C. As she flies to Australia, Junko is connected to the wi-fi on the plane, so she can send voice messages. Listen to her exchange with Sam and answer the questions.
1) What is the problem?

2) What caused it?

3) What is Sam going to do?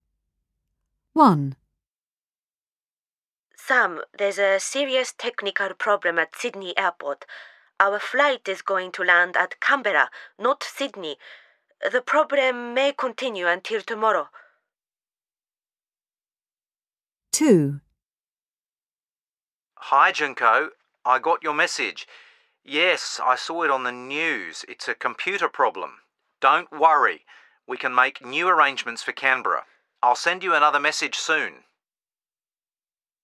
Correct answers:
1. Junko's flight is going to land at Canberra, not Sydney.
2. A computer problem.
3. He is going to make new arrangements for Canberra.

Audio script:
1 Sam, there's a serious technical problem at Sydney airport. Our flight is going to land at Canberra, not Sydney! The problem may continue until tomorrow!
2 Hi Junko. I got your message. Yes, I saw it on the news. It's a computer problem. Don't worry! We can make new arrangements for Canberra. I'll send you another message soon!